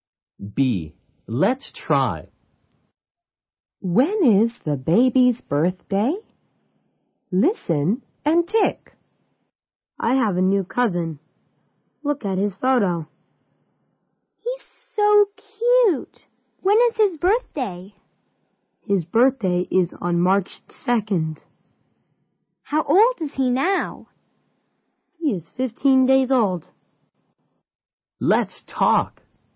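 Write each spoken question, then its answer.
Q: When is the baby's birthday?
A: March 2nd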